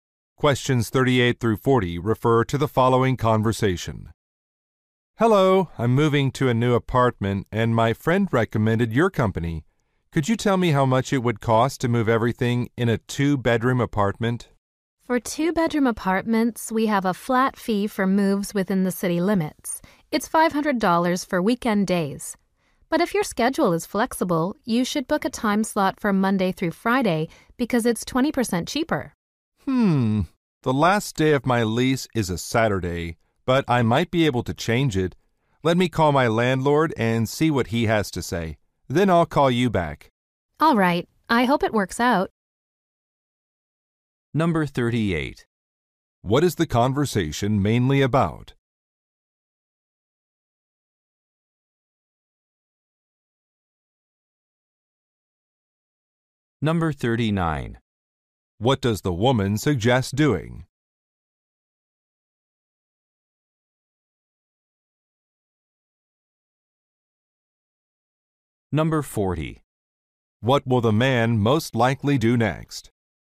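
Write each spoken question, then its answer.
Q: What is the conversation mainly about?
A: The cost of a moving service

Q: What does the woman suggest doing?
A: Booking a weekday move, which is 20% cheaper

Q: What will the man most likely do next?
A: Call his landlord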